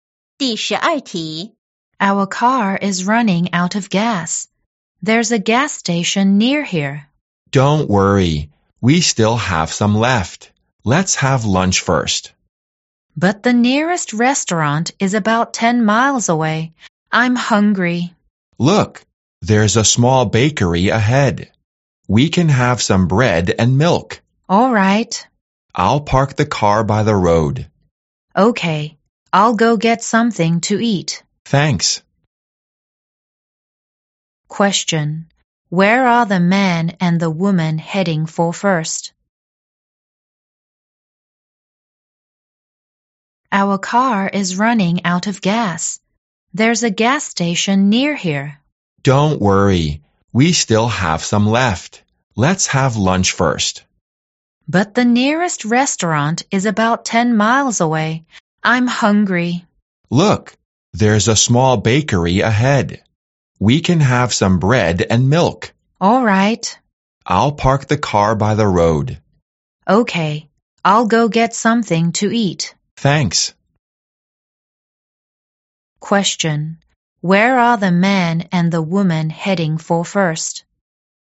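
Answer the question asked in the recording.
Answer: The small bakery ahead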